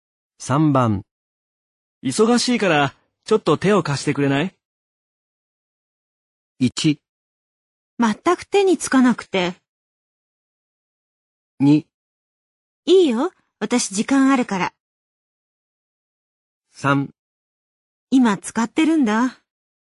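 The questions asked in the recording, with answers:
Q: 忙しいから、ちょっと手を貸してくれない?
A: 2: いいよ、私時間あるから。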